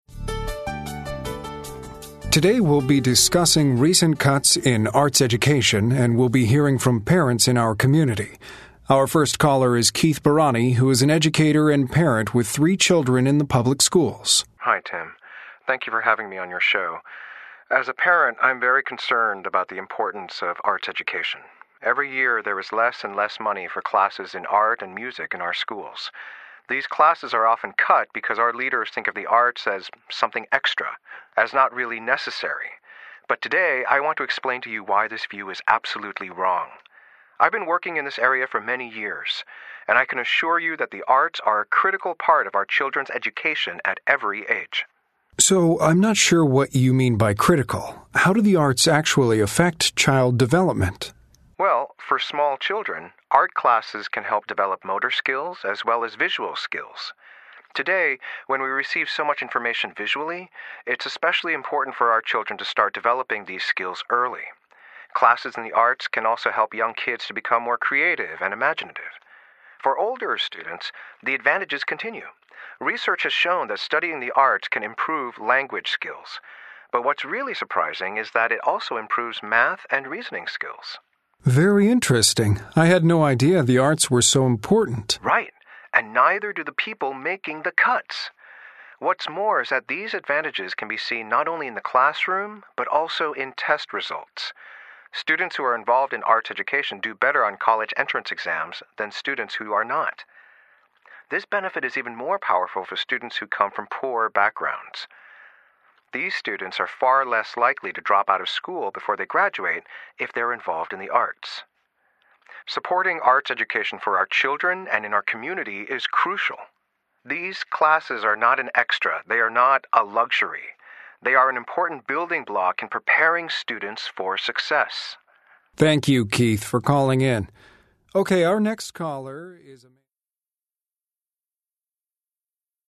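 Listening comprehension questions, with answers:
Listen to the interview. Then choose the correct answers.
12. What is an advantage of arts education for young children?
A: It develops motor and visual skills and creativity.

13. What is an advantage of arts education for older students?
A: It improves language, math and reasoning skills.

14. Why are art and music classes often cut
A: Leaders think the arts are extra, not really necessary.

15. Which student is likely to see the greatest benefits from arts education؟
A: A student from a poor background.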